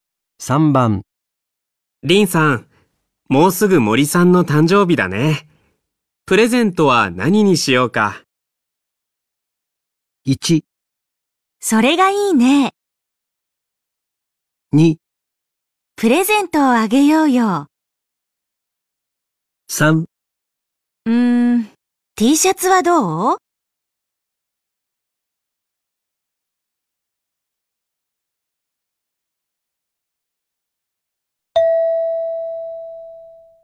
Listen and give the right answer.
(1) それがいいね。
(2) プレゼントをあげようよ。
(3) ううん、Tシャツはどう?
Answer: (3) ううん、Tシャツはどう?

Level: N4 Listening · Test 1